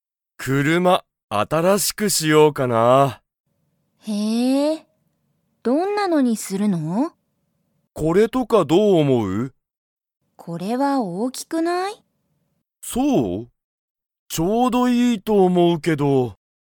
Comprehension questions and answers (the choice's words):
Comprehension Quiz (Skip if you don't understand the conversation yet)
アキラは、車くるまを____したい。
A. 新あたらしく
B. 大おおきく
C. 悪わるく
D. 小ちいさく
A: 新あたらしく

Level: Level 1